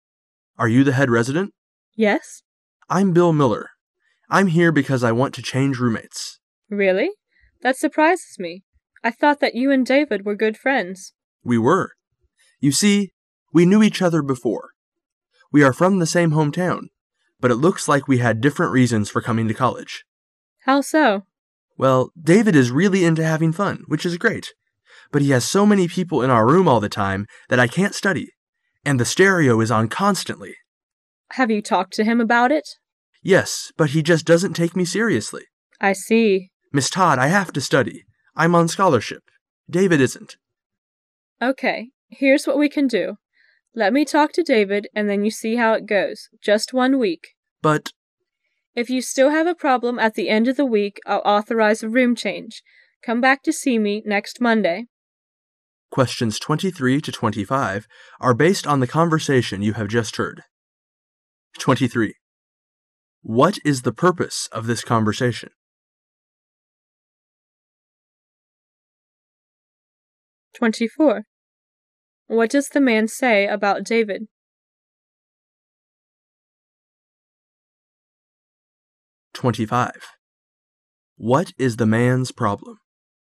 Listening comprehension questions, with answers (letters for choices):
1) What does the man say about David?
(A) That David is not a serious student.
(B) That David doesn't need to worry because he has a scholarship.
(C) That David won't speak with him.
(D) That David wants to move back to his home town.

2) What is the man's problem?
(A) His roommate is noisy.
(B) He isn't speaking to his roommate.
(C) He does not like his roommate.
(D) He doesn't know his roommate very well.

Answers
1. A
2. A

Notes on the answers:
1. [解题思路] 本题是细节题。 [详细解答] 先看题干,再有针对性的认真听。依据会话中提到的"David is really into having fun.""I'm on scholarship.David isn't."可以做出判断

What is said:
A
[解析] 23-25 M: Are you the head resident? W: Yes. M: I'm Bill Miller. I'm here because I want to change roommates. W: Really? That surprises me. I thought that you and David were good friends. M: We were. You see, we knew each other before. We are from the stone home town, but it looks like we had different reasons for coming to college. W: How so? M: Well, David is really into having fun, which is great. But he has so many people in our room all the time that I can't study. And the stereo is on constantly. W: Have you talked to him about it? M: Yes, but he just doesn't. take me seriously. W: I see. M: Miss Todd, I have to study. I'm on scholarship. David isn't. Okay. Here's what we can do. Let me talk to David, and then you see how it goes. Just one week. M: But... W: If you still have a problem at the end of the week, I'll authorize a room change. Come back to see me next Monday. 23.What is the purpose of this conversation?